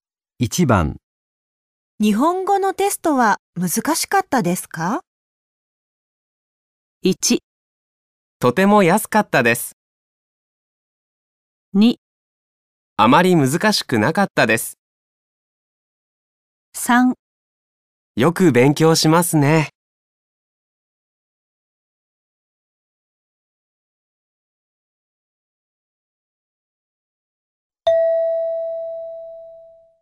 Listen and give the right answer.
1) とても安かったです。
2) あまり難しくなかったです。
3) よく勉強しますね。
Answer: 2) あまり難しくなかったです。

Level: N5 Listening · Test 3